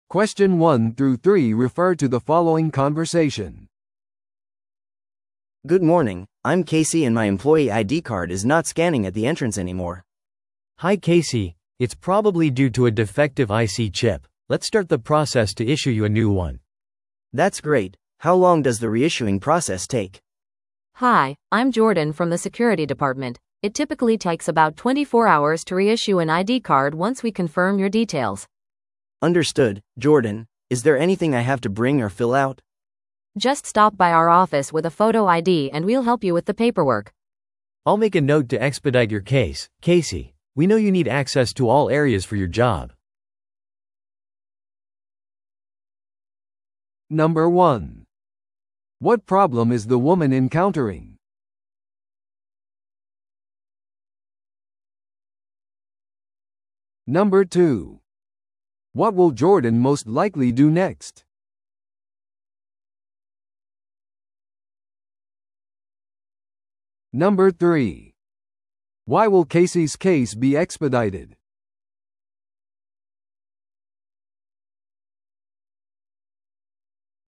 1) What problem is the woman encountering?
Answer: 彼女のICチップが機能していない。

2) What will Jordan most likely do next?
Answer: 再発行の手続きのお手伝いをする。

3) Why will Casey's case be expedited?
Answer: 彼女が仕事で全エリアへのアクセスが必要だから。

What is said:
A: Good morning, I'm Casey and my employee ID card is not scanning at the entrance anymore.
B: Hi Casey! It's probably due to a defective IC chip. Let's start the process to issue you a new one.
A: That's great. How long does the reissuing process take?
C: Hi, I'm Jordan from the security department. It typically takes about 24 hours to reissue an ID card once we confirm your details.
A: Understood, Jordan. Is there anything I have to bring or fill out?
C: Just stop by our office with a photo ID and we'll help you with the paperwork.
B: I'll make a note to expedite your case, Casey. We know you need access to all areas for your job.